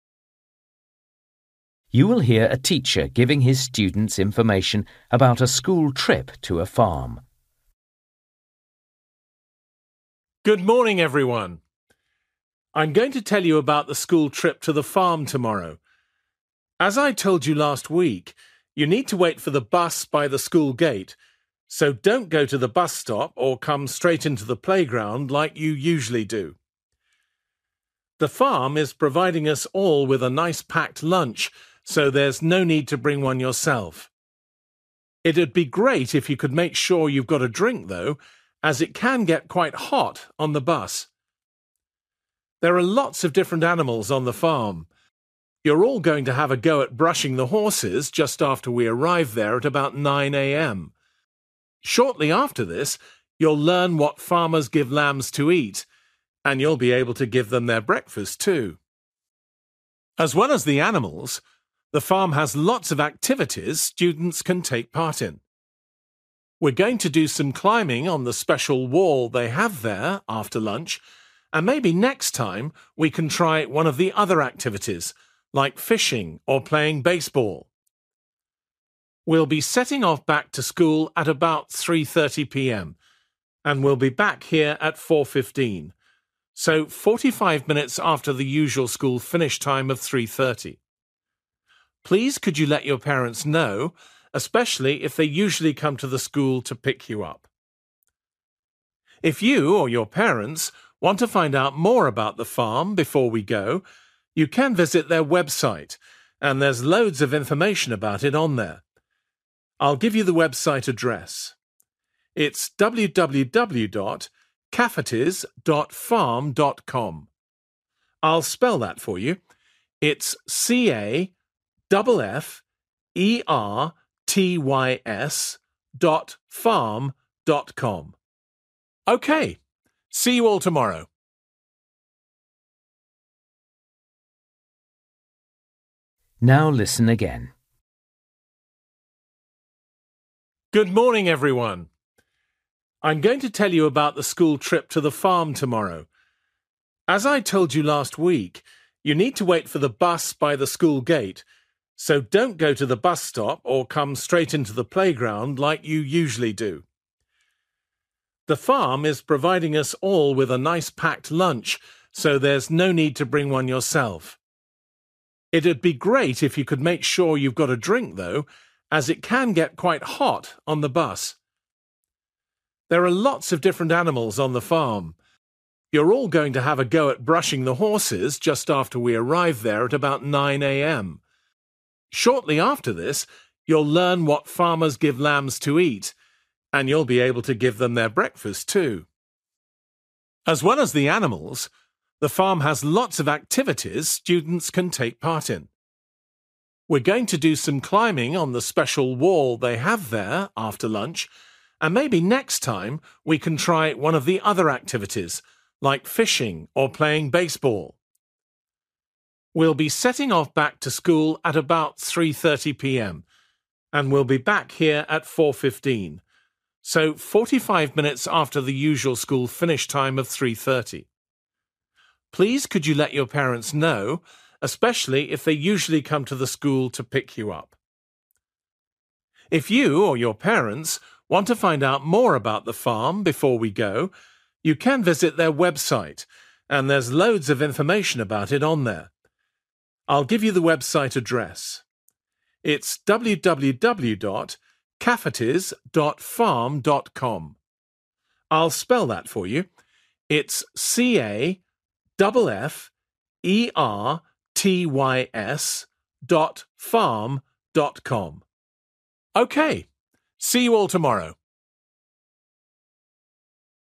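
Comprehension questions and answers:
For each question, write the correct answer in the gap. Write one or two words or a number or a date or a time. You will hear a teacher giving his students information about a school trip to a farm.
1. Meeting place: 8 a.m. next to the (1)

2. Need to bring: a (2)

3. Morning activity: feeding the (3)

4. Afternoon activity: (4)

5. Return to school at: (5)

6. For more information: (6) www. .farm.com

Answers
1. school gate
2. drink
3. lambs
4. climbing
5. 4:15
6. caffertys

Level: Luyện nghe trình độ B1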